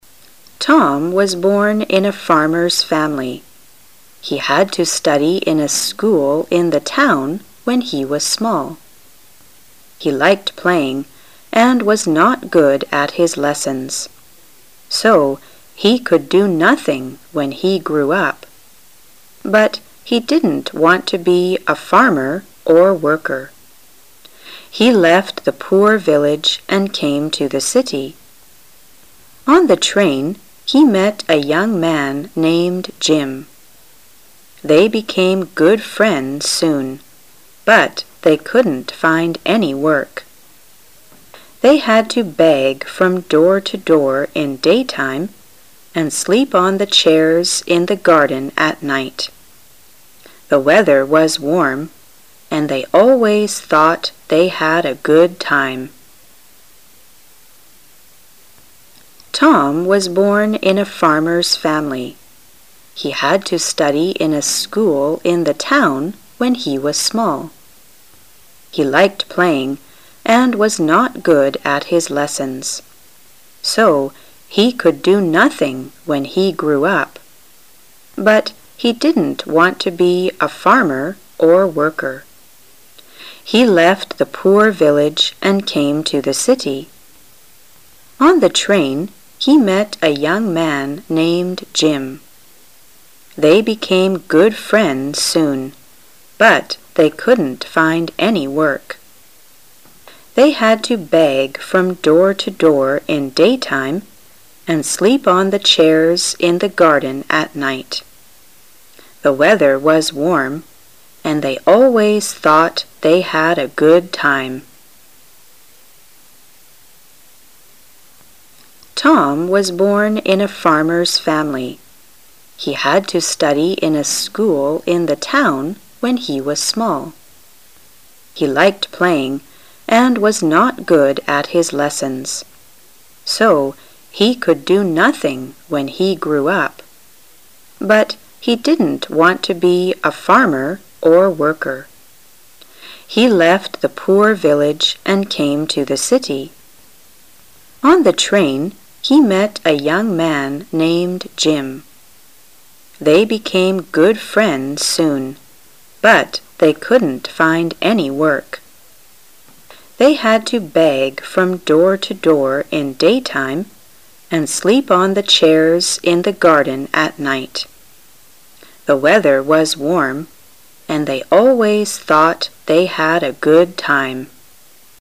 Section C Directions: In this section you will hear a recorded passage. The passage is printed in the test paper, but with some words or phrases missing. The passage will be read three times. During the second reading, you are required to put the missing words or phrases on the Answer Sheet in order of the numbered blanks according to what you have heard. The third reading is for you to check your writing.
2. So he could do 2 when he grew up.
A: nothing

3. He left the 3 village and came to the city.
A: poor

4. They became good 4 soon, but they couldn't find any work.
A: friends

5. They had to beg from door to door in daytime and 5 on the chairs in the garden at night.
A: sleep

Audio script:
[解析] 11-15 Tom was born in a farmer's family. He had to study in a school in the town when he was small. He liked playing and was not good at his lessons. So he could do nothing when he grew up. But he didn't want to be a farmer or worker. He left the poor village and came to the city. On the train he met a young man named Jim. They became good friends soon, but they couldn't find any work. They had to beg from door to door in daytime and sleep on the chairs in the garden at night. The weather was warm and they always thought they had a good time.